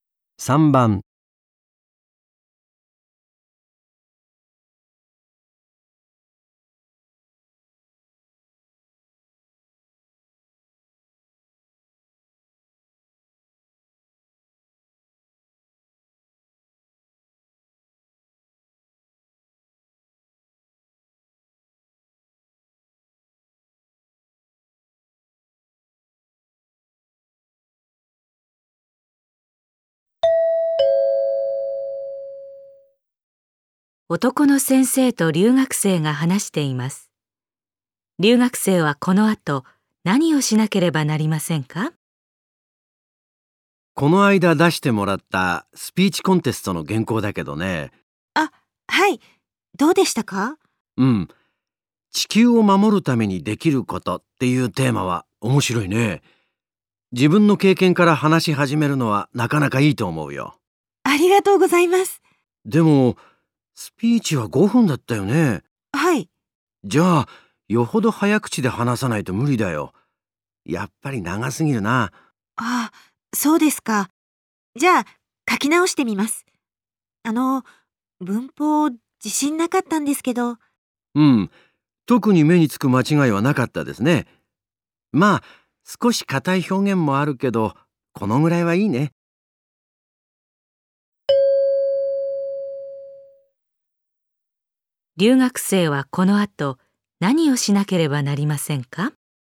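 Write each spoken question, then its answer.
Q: 留学生はこの後何をしなければなりませんか?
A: スピーチの原稿を短く書き直す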